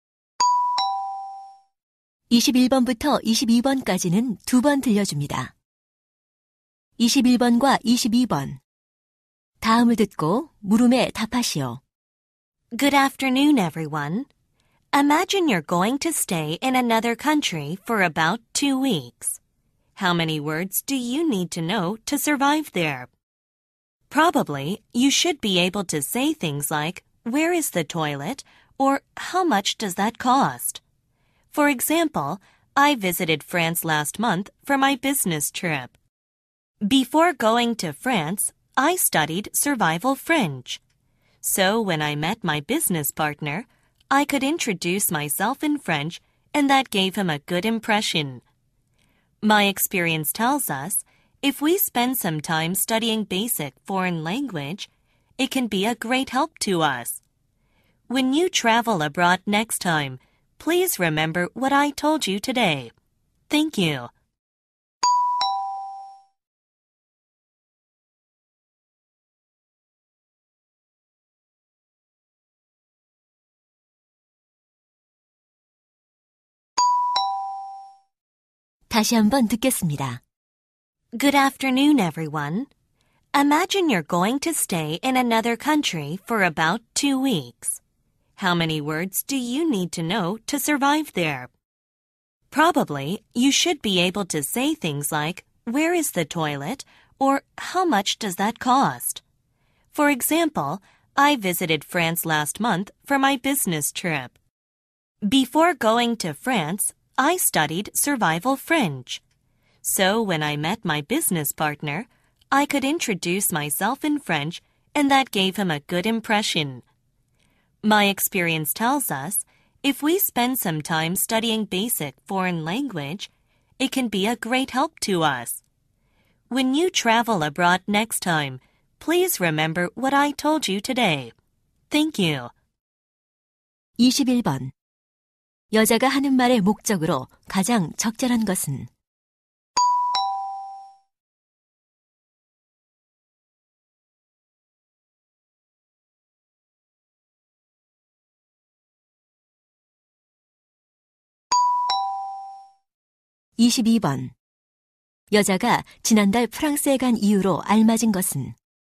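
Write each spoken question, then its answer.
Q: 21번 여자가 하는 말의 목적으로 가장 적절한 것은?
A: 해외여행 전 기초 외국어를 공부하도록 권하려고

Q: 여자가 지난달 프랑스에 간 이유로 알맞은 것은?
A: 출장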